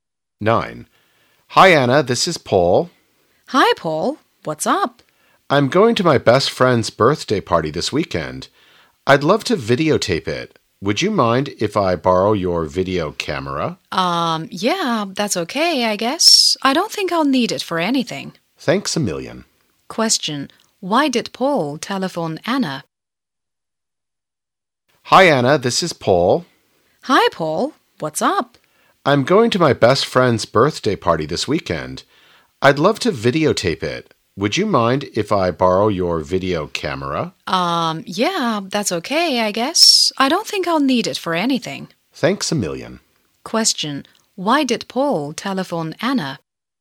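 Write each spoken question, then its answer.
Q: Why did Paul telephone Anna?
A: To borrow her video camera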